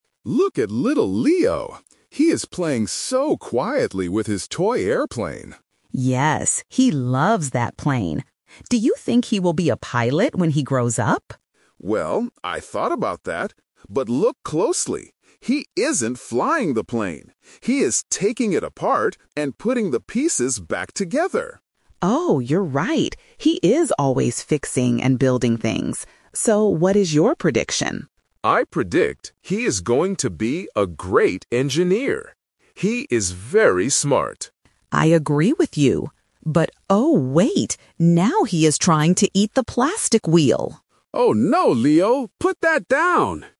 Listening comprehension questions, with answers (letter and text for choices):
Listen to the conversation between a grandfather and a grandmother. Choose the correct answer (A, B, or C).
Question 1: What does the grandmother ask about Leo's future at first?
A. Will he be a pilot?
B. Will he be an engineer?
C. Will he be a doctor?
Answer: A. Will he be a pilot?

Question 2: Why does the grandfather predict Leo will be an engineer?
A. Because Leo likes flying his toy airplane around the room.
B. Because Leo is taking the toy apart and putting it back together.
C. Because Leo is eating the plastic wheel.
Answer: B. Because Leo is taking the toy apart and putting it back together.

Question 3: What happens at the end of the conversation?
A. Leo breaks his toy airplane.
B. Leo successfully builds a new toy.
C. Leo puts a piece of the toy in his mouth.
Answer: C. Leo puts a piece of the toy in his mouth.

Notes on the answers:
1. The grandmother asks, "Do you think he will be a pilot when he grows up?"
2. The grandfather notices that Leo is not playing normally, but instead "taking it apart and putting the pieces back together", which is what an engineer does.
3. At the end, the grandmother panics and says, "Now he is trying to eat the plastic wheel!"

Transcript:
Grandpa: Look at little Leo. He is playing so quietly with his toy airplane.
Grandma: Yes, he loves that plane. Do you think he will be a pilot when he grows up?
Grandpa: Well, I thought about that. But look closely! He isn't flying the plane. He is taking it apart and putting the pieces back together.
Grandma: Oh, you're right! He is always fixing and building things. So, what is your prediction?
Grandpa: I predict he is going to be a great engineer. He is very smart.
Grandma: I agree with you. But oh, wait! Now he is trying to eat the plastic wheel!

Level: A2